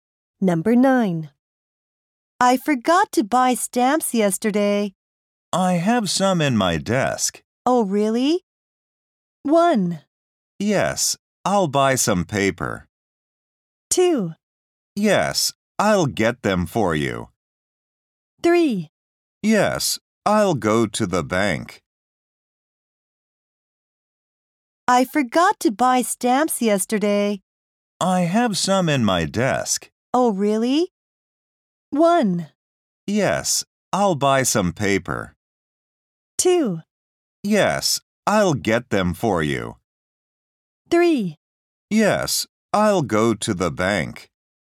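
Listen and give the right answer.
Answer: 2: Yes, I'll get them for you.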